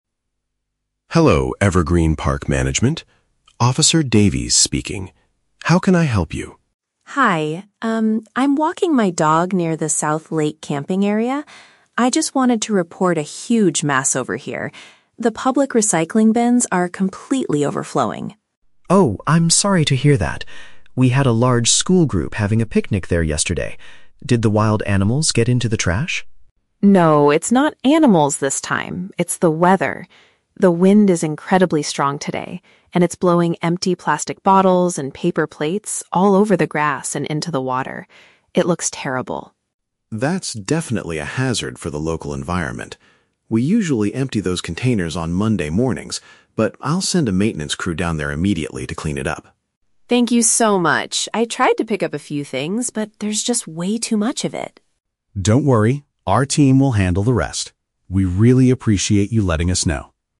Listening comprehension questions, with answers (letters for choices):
Listen to the telephone conversation between a park visitor and a management officer, then choose the correct answer (A, B, or C) for each question.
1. What is the main problem Sarah is calling about?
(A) A school group left their camping equipment behind.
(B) The garbage containers in the park are completely full.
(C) Some dogs are eating the leftover food on the grass.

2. Why is the rubbish spreading all over the area?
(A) Because the weather conditions are causing it to fly around.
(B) Because the maintenance workers dropped it on the ground.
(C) Because wild animals destroyed the plastic garbage bags.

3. What does Officer Davies promise to do?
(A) Wait until Monday morning to empty the recycling bins.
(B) Close the South Lake camping area to all visitors.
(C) Dispatch some workers to tidy the location right away.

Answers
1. B
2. A
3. C

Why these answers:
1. Sarah reports that the "public recycling bins are completely overflowing." Option (B) uses the paraphrase "completely full" for "overflowing." Option (A) is a trap; a school group was there for a picnic, but they didn't leave equipment behind. Option (C) is a trap; Sarah is "walking her dog," but dogs are not eating the food.
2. Sarah explains that "It's the weather. The wind is incredibly strong today, and it's blowing empty plastic bottles..." Option (A) uses paraphrasing ("weather conditions" for "wind", "fly around" for "blowing"). Option (C) is a trap; the officer asks if wild animals got into the trash, but Sarah explicitly says "No, it's not animals this time." Option (B) is a trap; the maintenance workers are the ones who will clean it up, not the ones who dropped it.
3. Officer Davies says, "I'll send a maintenance crew down there immediately to clean it up." Option (C) uses synonyms ("dispatch" = "send", "workers" = "maintenance crew", "tidy" = "clean up", "right away" = "immediately"). Option (A) is a trap; the officer says they usually empty them on Monday mornings, but in this urgent case, he will not wait. Option (B) is a plausible safety measure but is never mentioned in the audio.

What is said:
Officer Davies: Hello, Evergreen Park Management. Officer Davies speaking. How can I help you?
Sarah: Hi, um, I'm walking my dog near the South Lake camping area. I just wanted to report a huge mess over here. The public recycling bins are completely overflowing.
Officer Davies: Oh, I'm sorry to hear that. We had a large school group having a picnic there yesterday. Did the wild animals get into the trash?
Sarah: No, it's not animals this time. It's the weather. The wind is incredibly strong today, and it's blowing empty plastic bottles and paper plates all over the grass and into the water. It looks terrible.
Officer Davies: That's definitely a hazard for the local environment. We usually empty those containers on Monday mornings, but I'll send a maintenance crew down there immediately to clean it up.
Sarah: Thank you so much. I tried to pick up a few things, but there's just way too much of it.
Officer Davies: Don't worry, our team will handle the rest. We really appreciate you letting us know.